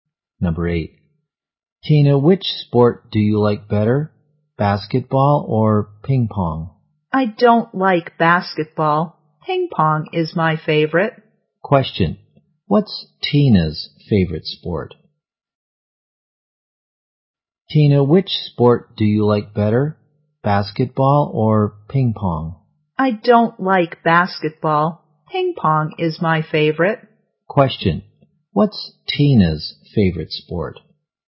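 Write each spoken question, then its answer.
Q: Question.What's Tina's favorite sport?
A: Ping pong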